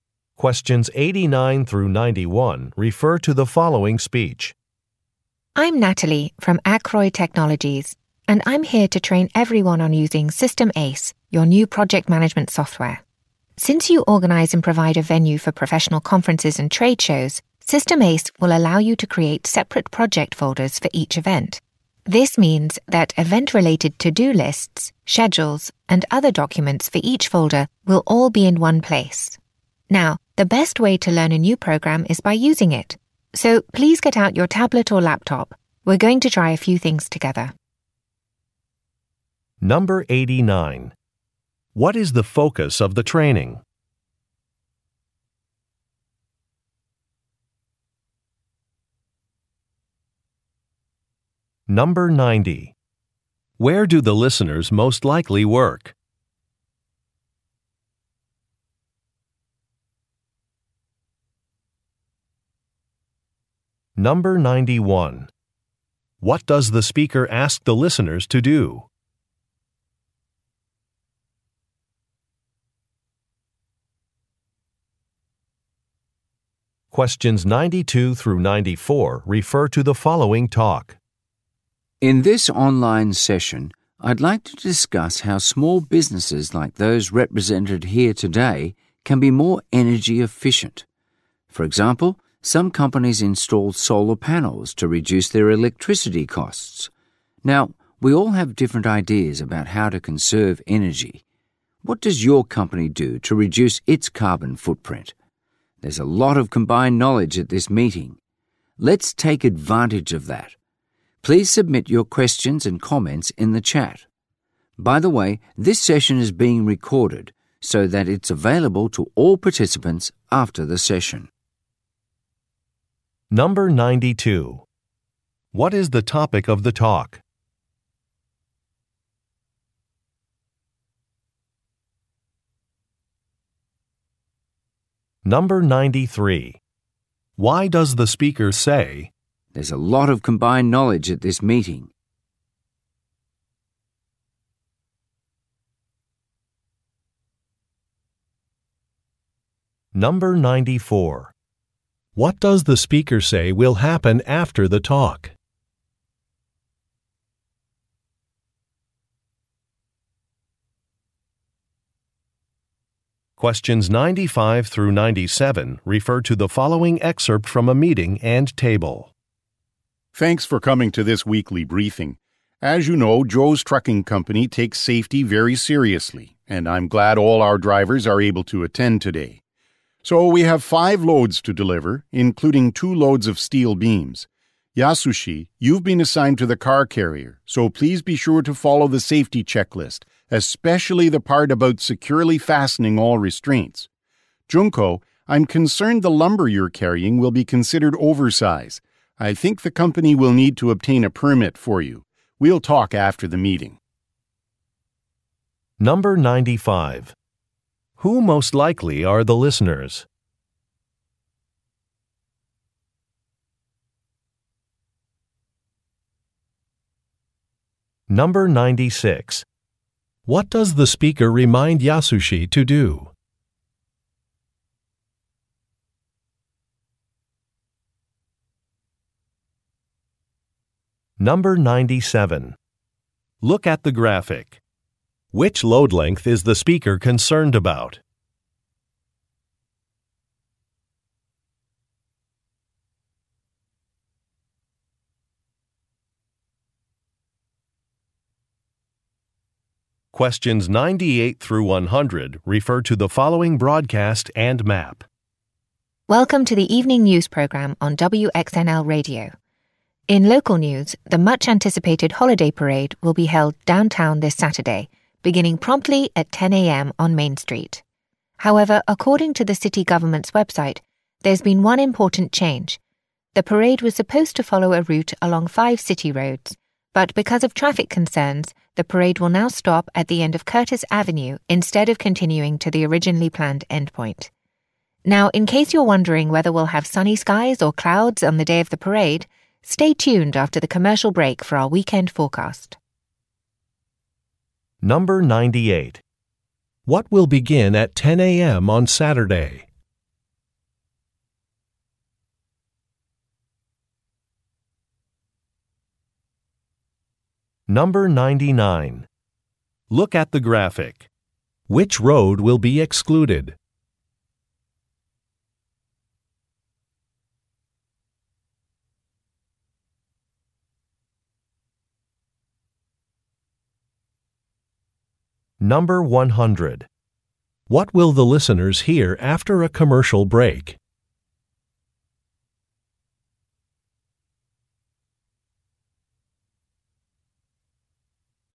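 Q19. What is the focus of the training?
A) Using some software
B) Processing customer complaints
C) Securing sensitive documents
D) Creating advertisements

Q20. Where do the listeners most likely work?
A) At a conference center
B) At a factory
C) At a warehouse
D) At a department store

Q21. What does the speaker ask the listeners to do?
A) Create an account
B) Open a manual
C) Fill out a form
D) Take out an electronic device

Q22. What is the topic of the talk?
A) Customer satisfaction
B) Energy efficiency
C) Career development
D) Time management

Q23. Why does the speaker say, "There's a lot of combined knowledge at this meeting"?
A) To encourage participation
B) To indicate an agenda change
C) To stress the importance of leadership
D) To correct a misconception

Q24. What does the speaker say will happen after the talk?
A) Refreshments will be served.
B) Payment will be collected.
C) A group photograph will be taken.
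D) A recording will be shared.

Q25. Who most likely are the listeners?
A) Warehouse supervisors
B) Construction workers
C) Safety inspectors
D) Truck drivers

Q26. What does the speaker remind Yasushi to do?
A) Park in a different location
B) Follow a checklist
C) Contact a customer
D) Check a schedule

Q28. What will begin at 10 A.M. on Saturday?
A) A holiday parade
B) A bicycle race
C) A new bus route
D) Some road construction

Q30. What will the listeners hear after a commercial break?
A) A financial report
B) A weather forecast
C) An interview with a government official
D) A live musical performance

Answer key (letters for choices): 19A, 20A, 21D, 22B, 23A, 24D, 25D, 26B, 28A, 30B

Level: Nhận biết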